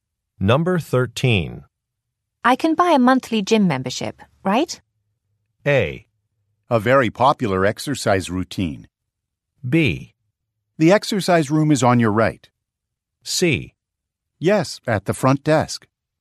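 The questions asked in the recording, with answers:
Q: I can buy a monthly gym membership, right?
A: C: Yes, at the front desk.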